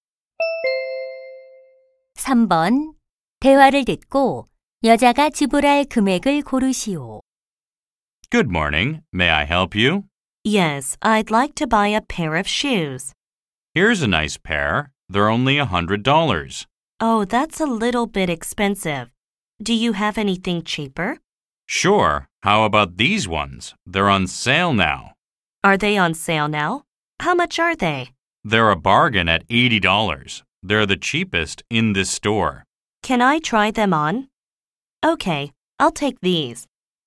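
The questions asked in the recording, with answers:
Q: 대화를 듣고 여자가 지불할 금액을 고르시오.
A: 80달러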